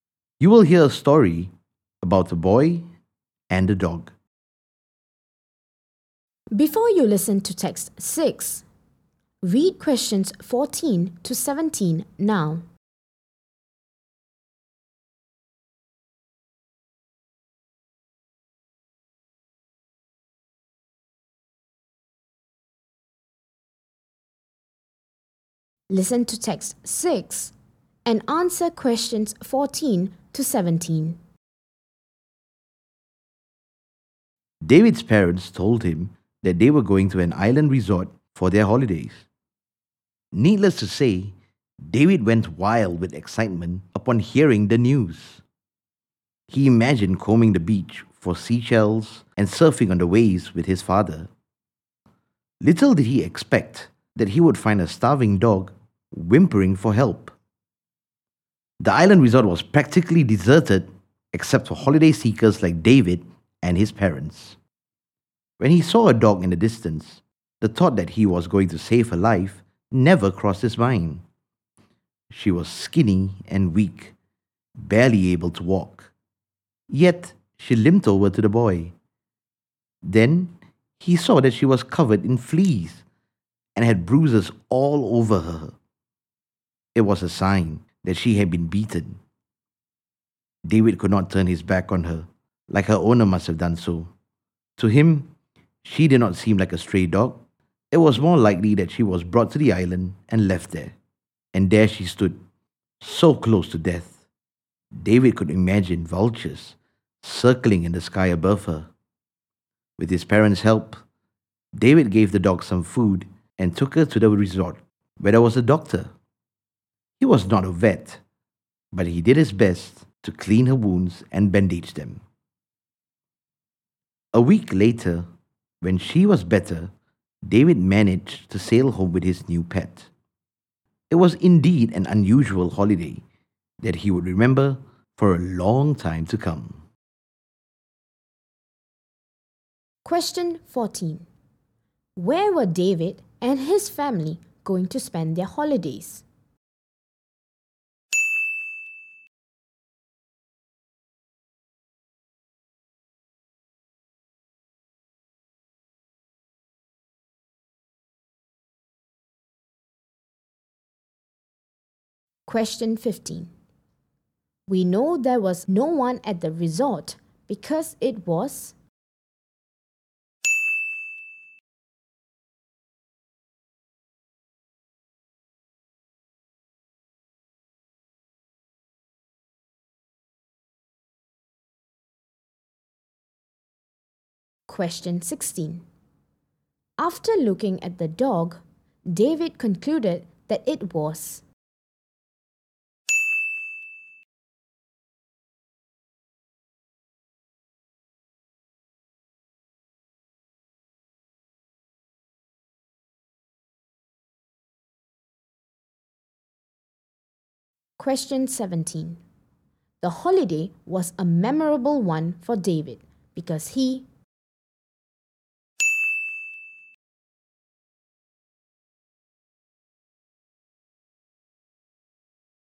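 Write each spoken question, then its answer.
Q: Where were David and his family going to spend their holidays?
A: At an island resort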